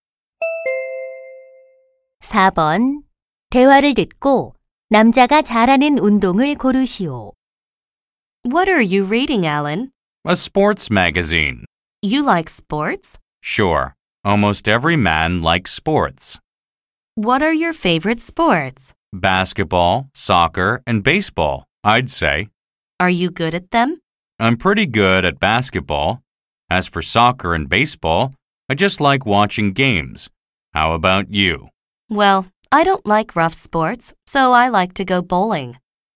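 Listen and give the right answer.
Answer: 농구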